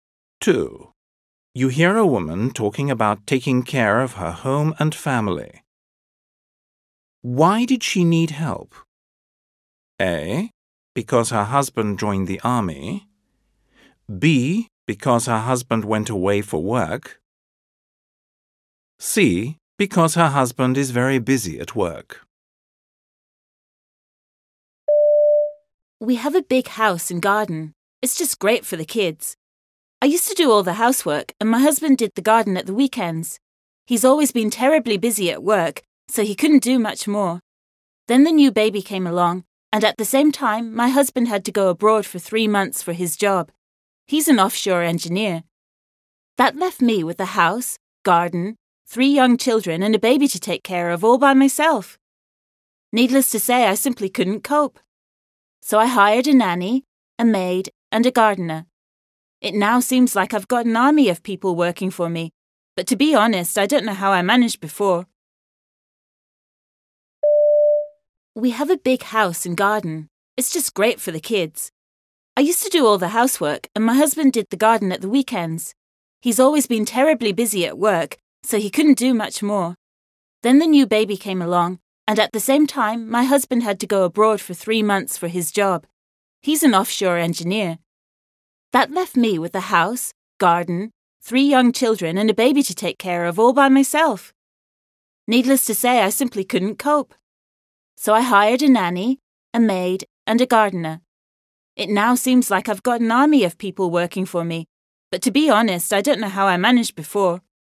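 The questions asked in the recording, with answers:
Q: Why did she need help?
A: B: Because her husband went away for work.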